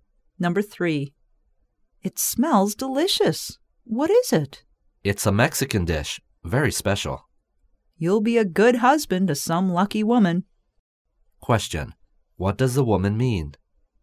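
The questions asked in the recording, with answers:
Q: What does the woman mean?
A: The man is a good cook.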